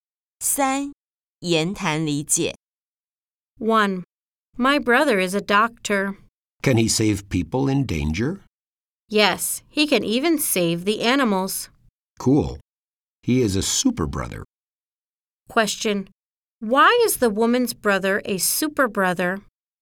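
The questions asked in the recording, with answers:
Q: Why is the woman's brother a super brother?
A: He can save people and even animals in danger.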